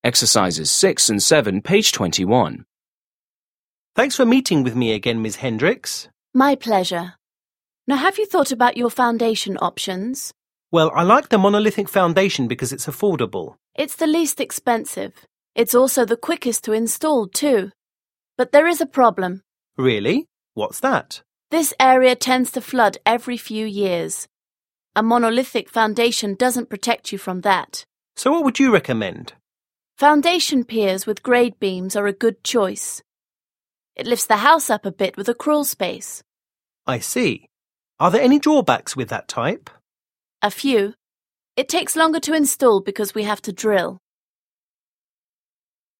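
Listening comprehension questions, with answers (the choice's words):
7. Listen again and complete the conversation.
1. Well, I liked the monolithic foundation because it's 1 ______.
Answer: affordable

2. It's also the 2 ____ ____ ___, too.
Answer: quickest to install

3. This area 3 ____ ____ flood every few years.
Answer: tends to

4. Foundation piers with grade beams are 4 ___ ___ ___ .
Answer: a good choice

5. Are there any 5 ___ with that type?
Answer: drawbacks

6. It 6 ___ ___ to install because we have to drill.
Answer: takes longer

6 Listen to a conversation between a potential customer and a contractor. Mark the following statements as true (T) or false (F).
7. What is the conversation mainly about?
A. how to install a foundation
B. the pros and cons of different foundations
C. why the man cannot use a certain foundation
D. the cause of damage to the man's foundation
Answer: the pros and cons of different foundations

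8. What does the man like about monolithic foundation?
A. the price of installation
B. the speed of installation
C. the option for a crawl space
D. the protection from flooding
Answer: the price of installation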